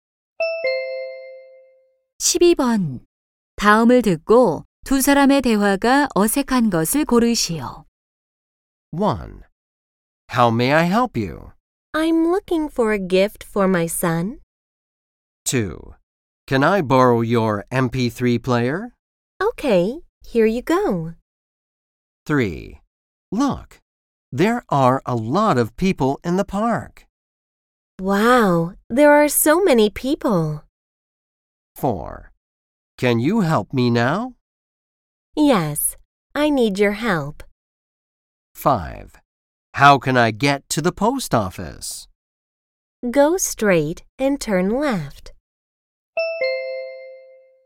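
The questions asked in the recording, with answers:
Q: 다음을 듣고 두 사람의 대화가 어색한 것을 고르시오.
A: 4: Can you help me now? / Yes, I need your help.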